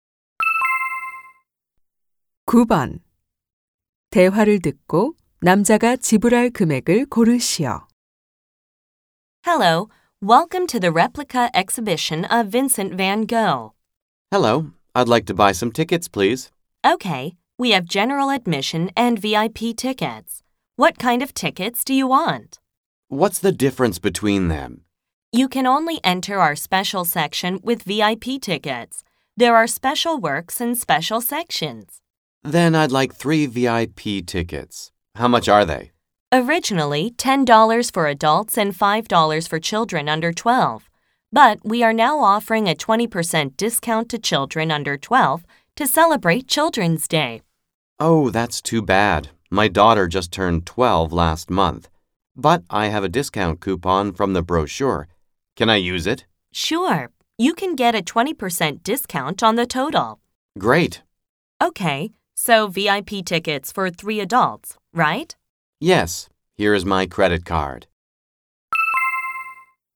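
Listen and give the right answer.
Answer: $24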